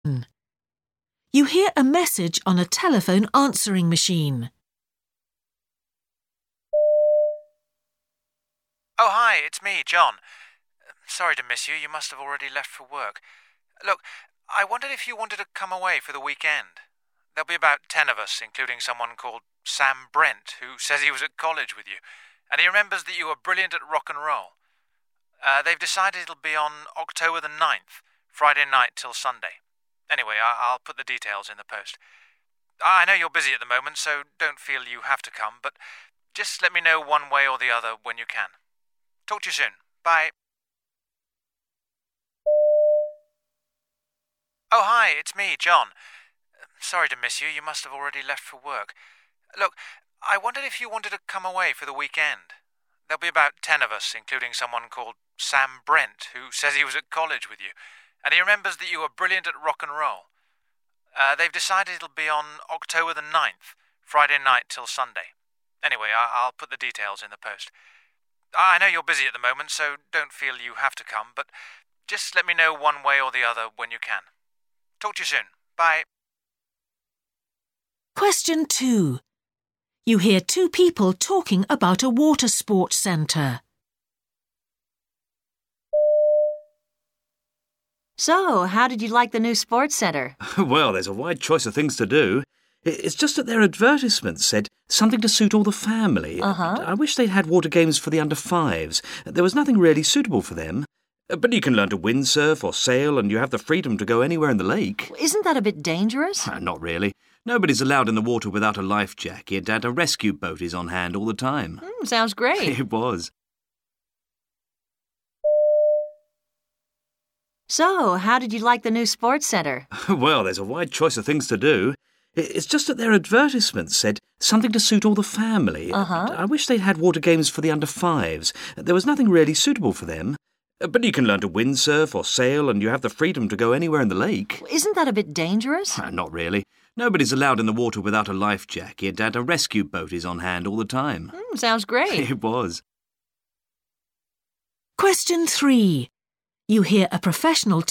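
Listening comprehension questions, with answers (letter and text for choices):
Escucha el audio y contesta las preguntas.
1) You hear a message on a telephone answering machine. Why is the speaker calling?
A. to confirm some arrangements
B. to issue an invitation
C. to persuade someone to do something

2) You hear two people talking about a water-sports centre. The man says the centre should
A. pay more attention to safety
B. offer activities for small children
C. provide all the equipment needed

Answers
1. B. to issue an invitation
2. B. offer activities for small children

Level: A2 a C1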